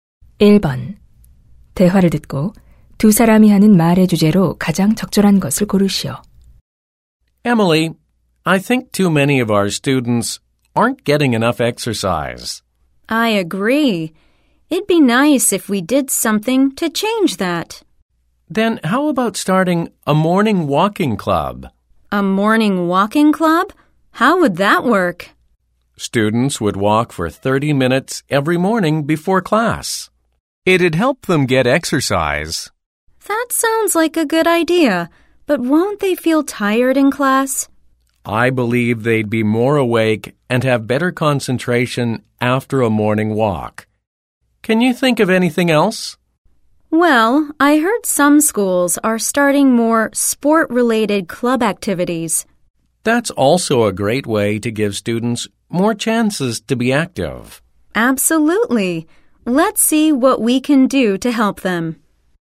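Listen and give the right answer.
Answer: 학생들의 운동량을 늘리는 방법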